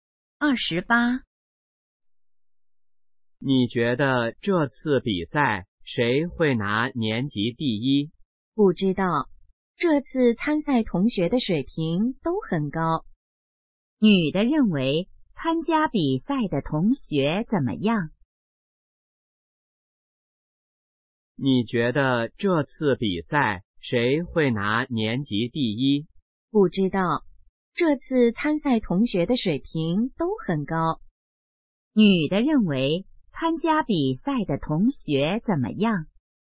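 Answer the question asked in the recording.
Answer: 水平都很高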